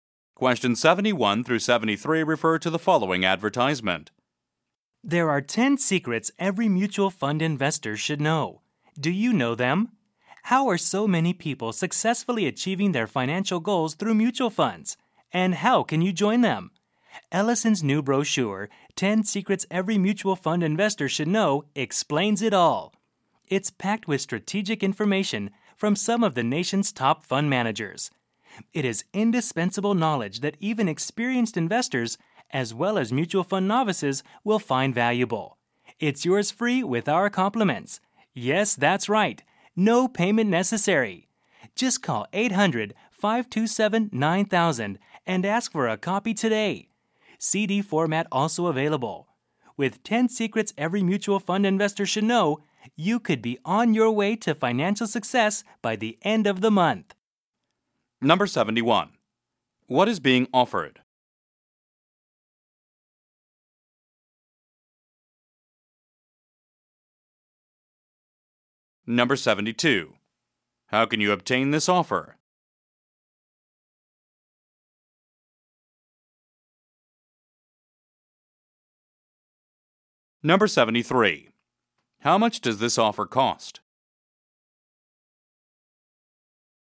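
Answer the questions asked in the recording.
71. A free brochure about mutual fund investing
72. By calling 800-527-9000
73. Nothing; it is free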